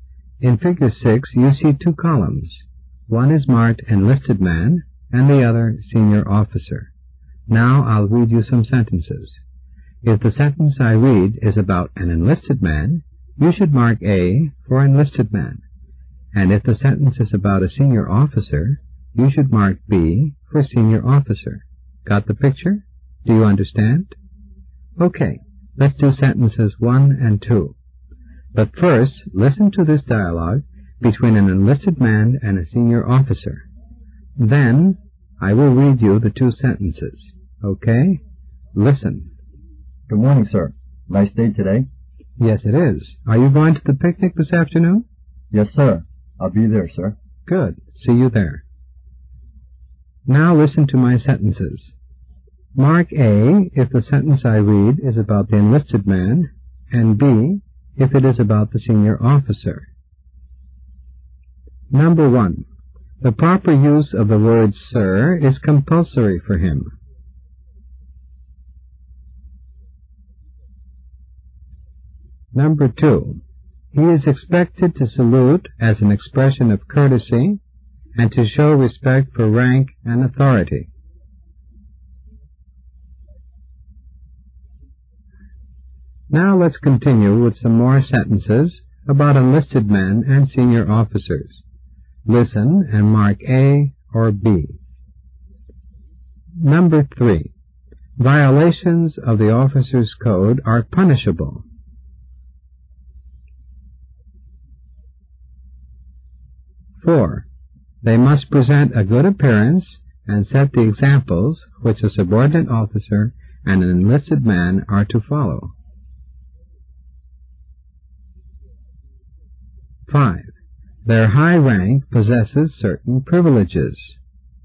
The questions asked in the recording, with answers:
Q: The proper use of the word sir is compulsory for him.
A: Number 1 is A, an enlisted man.

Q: He is expected to salute as an expression of courtesy and to show respect for rank and authority.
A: For number 2, the correct answer is also A.

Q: Violations of the officer's code are punishable.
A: In number 3, the answer should be the letter B, a senior officer.

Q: they must present a good appearance and set the examples which a subordinate officer and an enlisted man are to follow.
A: The answer to number 4 is also B.

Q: their high rank possesses certain privileges.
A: Again, the correct answer is B.